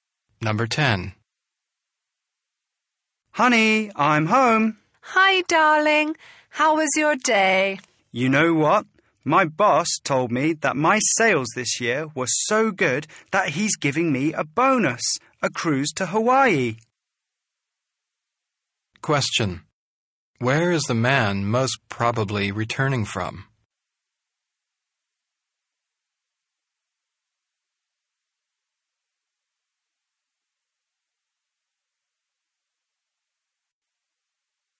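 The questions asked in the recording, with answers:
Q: Where is the man most probably returning from?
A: From work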